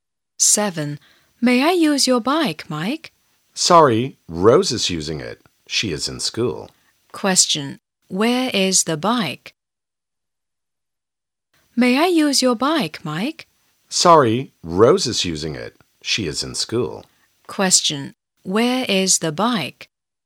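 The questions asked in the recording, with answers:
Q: Question. Where is the bike?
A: At school (Rose is using it)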